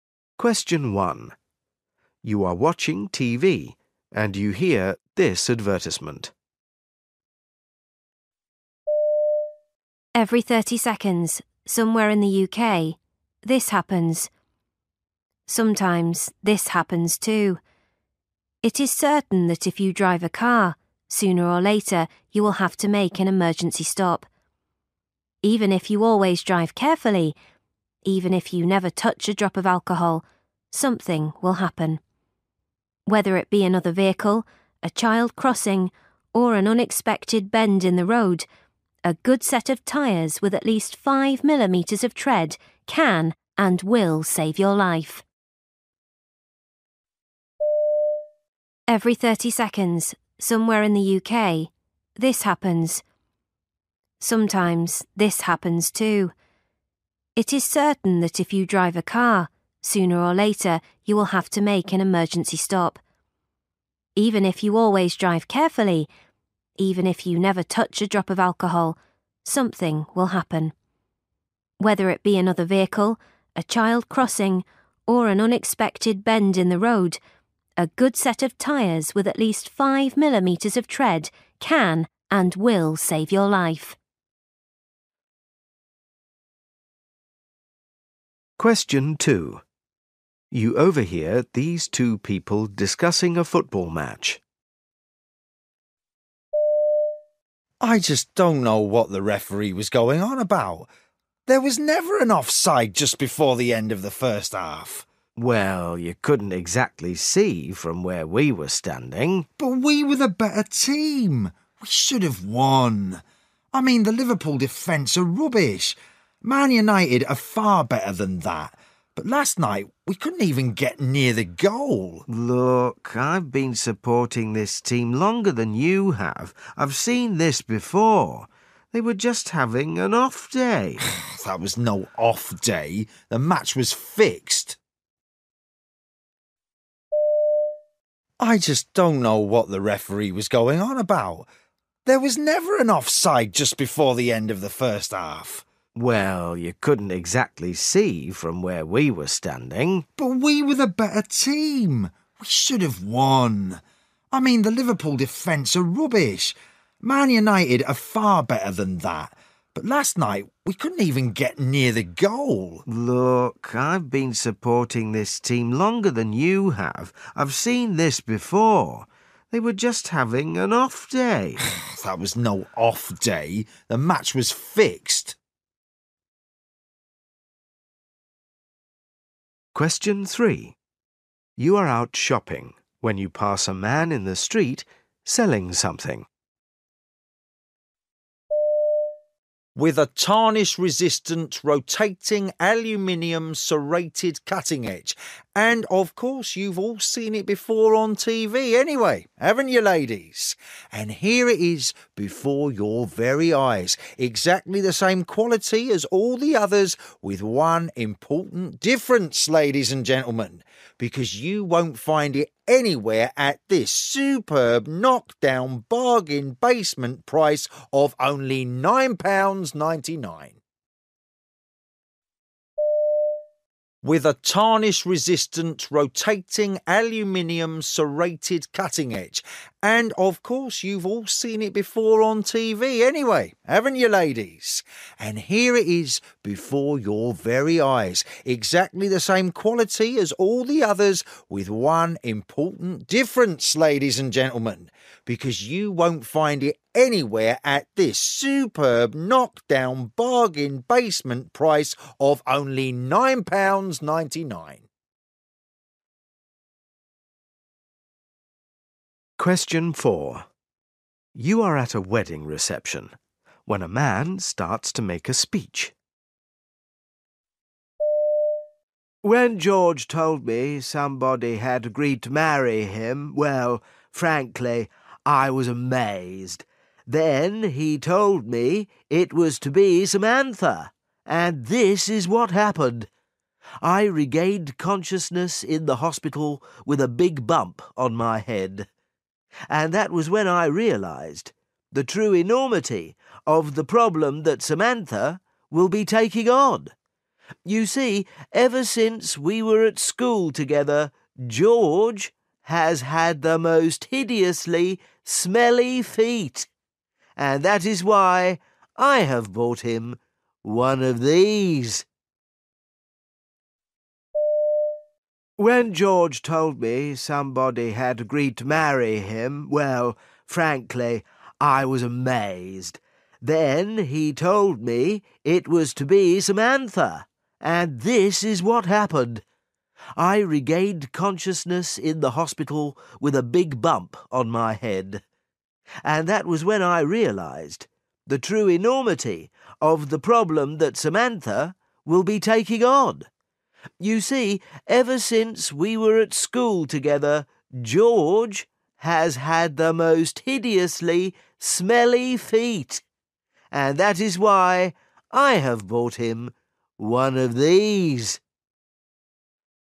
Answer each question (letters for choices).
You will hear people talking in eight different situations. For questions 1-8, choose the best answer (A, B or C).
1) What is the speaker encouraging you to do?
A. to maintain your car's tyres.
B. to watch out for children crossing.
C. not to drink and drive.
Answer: A

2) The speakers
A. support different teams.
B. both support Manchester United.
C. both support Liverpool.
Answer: B

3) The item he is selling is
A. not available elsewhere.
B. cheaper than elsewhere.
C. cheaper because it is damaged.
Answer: B

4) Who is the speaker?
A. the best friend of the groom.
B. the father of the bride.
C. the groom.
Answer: A

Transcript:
1 You are watching TV and you hear this advertisement.
Every thirty seconds, somewhere in the UK, this happens, ... Sometimes this happens, too ... It is certain that if you drive a car, sooner or later you will have to make an emergency stop. Even if you always drive carefully; even if you never touch a drop of alcohol, something will happen. Whether it be another vehicle, a child crossing, or an unexpected bend in the road, a good set of tyres with at least five millimetres of tread can and will save your life.
2 You overhear these two people discussing a football match.
M1 = Man 1 M2 = Man 2
M1: I just don't know what the referee was going on about. There was never an off-side just before the end of the first half!
M2: Well, you couldn't exactly see from where we were standing.
M1: But we were the better team; we should have won. I mean the Liverpool defence are rubbish. Man. United are far better than that, but last night, we couldn't even get near the goal.
M2: Look, I've been supporting this team longer than you have. I've seen this before. They were just having an 'off day'.
M1: That was no 'off day', the match was fixed.
3 You are out shopping when you pass a man in the street selling something.
with a tarnish resistant, rotating, aluminium, serrated cutting edge. And, of course, you've all seen it before on TV anyway, haven't you ladies? and here it is before your very eyes, exactly the same quality as all the others with one important difference, ladies and gentlemen ... because you won't find it anywhere at this superb knock-down, bargain-basement price of only £9.99.
4 You are at a wedding reception when a man starts to make a speech.
When George told me somebody had agreed to marry him, well, frankly, I was amazed. Then he told me it was to be Samantha, and this is what happened ... I regained consciousness in the hospital with a big bump on my head ... And that was when I realised the true enormity of the problem that Samantha will be taking on. You see, ever since we were at school together, George has had the most hideously smelly feet ... and that is why I have bought him one of these ...